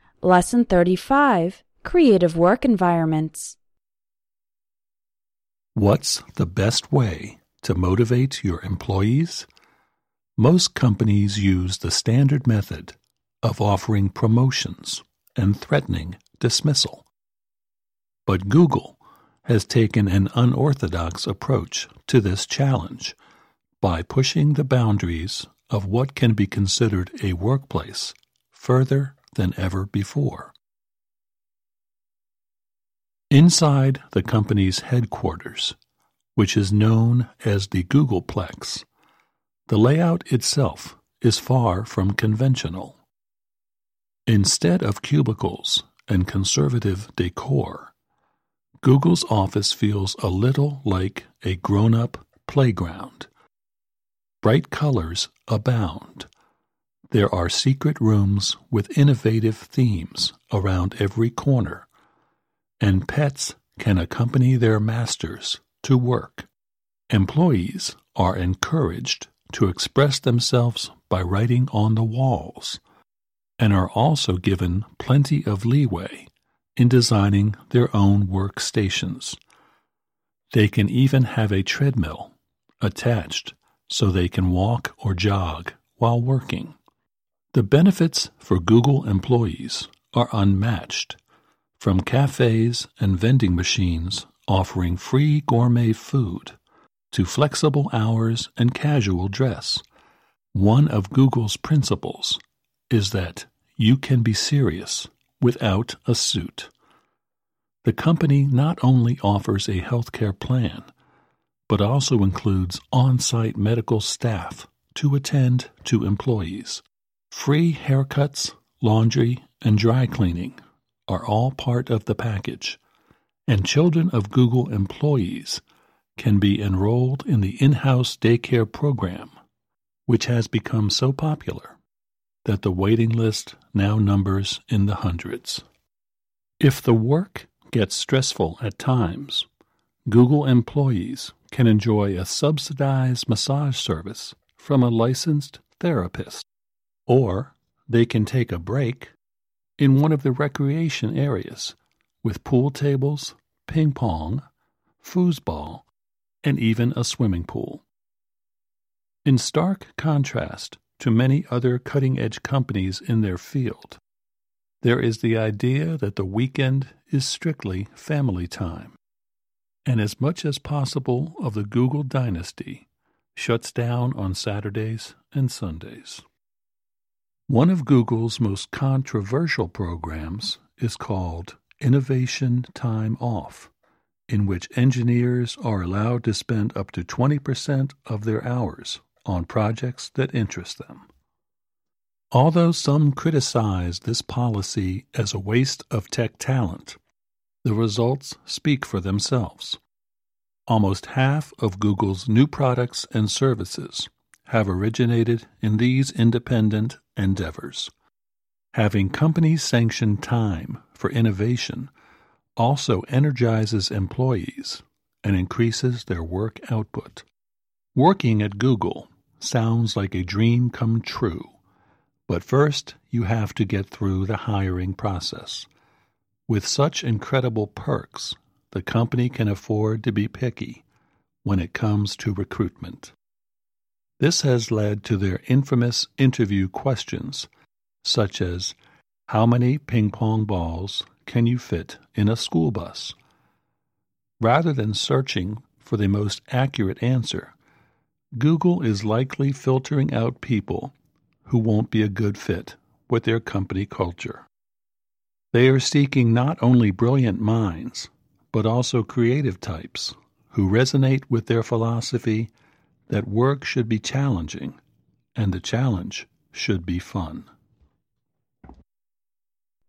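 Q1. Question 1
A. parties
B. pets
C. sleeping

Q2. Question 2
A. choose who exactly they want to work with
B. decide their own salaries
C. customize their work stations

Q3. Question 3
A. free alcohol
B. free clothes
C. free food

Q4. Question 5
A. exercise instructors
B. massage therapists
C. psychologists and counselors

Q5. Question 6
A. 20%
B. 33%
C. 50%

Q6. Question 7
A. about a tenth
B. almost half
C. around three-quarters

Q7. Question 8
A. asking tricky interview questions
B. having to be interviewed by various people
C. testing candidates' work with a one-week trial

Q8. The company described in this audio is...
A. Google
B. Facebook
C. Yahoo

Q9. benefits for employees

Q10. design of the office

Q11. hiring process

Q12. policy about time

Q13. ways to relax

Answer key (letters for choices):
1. B
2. C
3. C
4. B
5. A
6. B
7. A
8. A
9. 2
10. 1
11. 5
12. 4
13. 3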